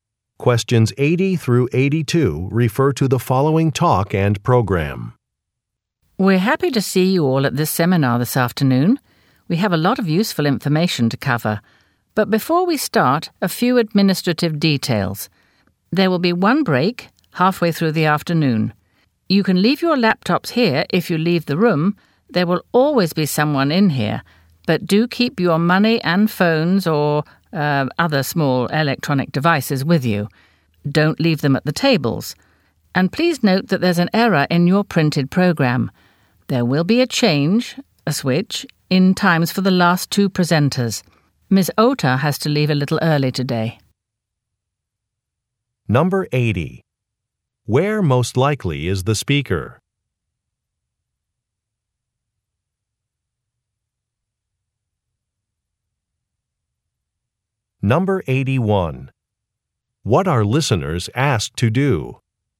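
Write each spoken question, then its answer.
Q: Where most likely is the speaker?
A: At a seminar

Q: What are listeners asked to do?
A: Keep money, phones and small electronic devices with them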